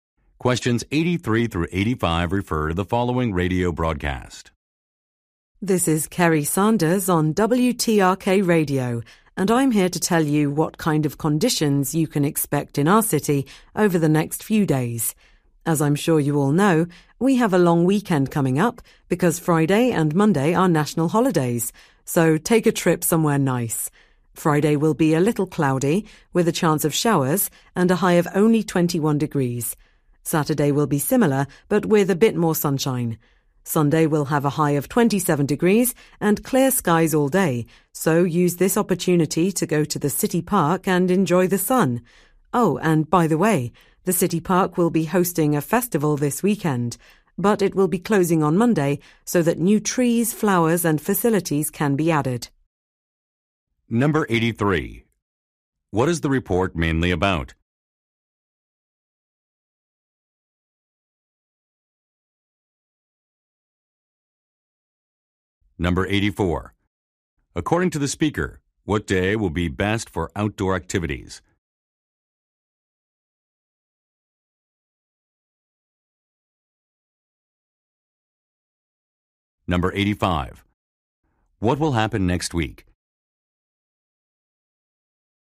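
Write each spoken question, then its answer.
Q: What is the report mainly about?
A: The weather forecast

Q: According to the speaker, what day will be best for outdoor activities?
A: Sunday

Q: What will happen next week?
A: The city park will close for improvements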